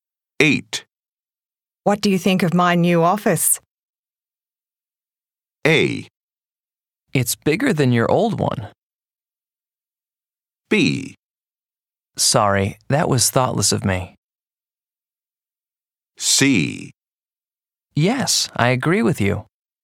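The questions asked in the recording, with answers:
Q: What do you think of my new office?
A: A: It's bigger than your old one.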